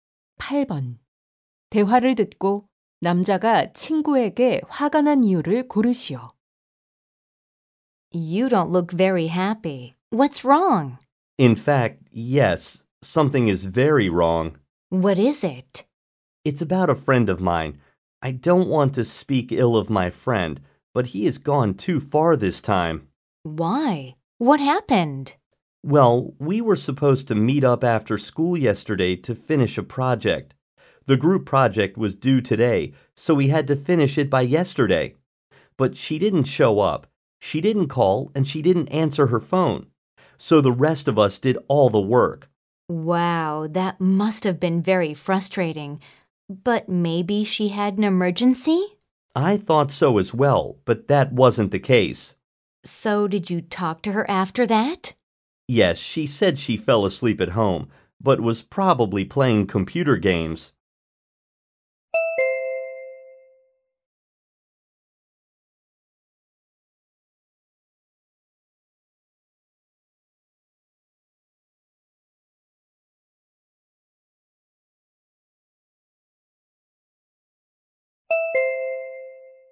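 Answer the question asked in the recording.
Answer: 친구가 조별 과제 모임에 연락 없이 나타나지 않아서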